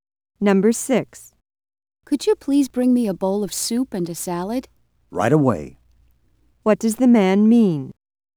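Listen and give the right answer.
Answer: He will bring the soup and salad immediately.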